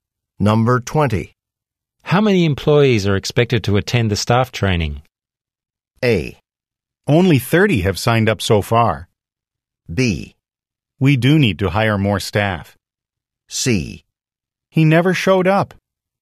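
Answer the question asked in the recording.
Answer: A: Only 30 have signed up so far.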